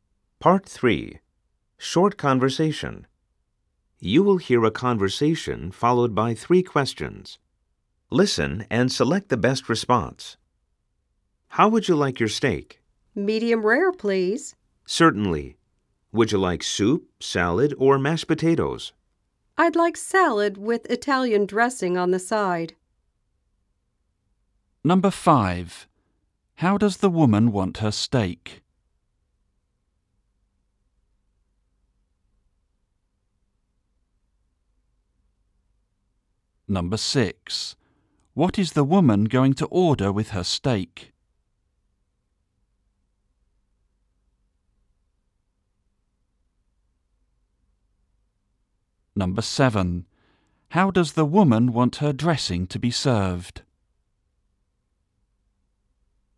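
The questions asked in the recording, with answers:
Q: How does the woman want her steak?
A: Medium rare

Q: What is the woman going to order with her steak?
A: Salad

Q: How does the woman want her dressing to be served?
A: On the side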